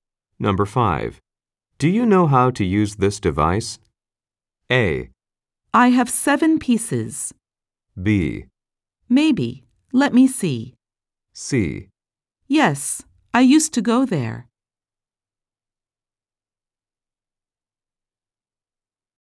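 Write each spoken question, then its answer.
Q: Do you know how to use this device?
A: B: Maybe. Let me see.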